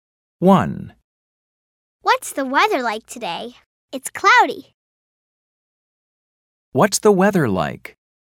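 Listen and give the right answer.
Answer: It's cloudy.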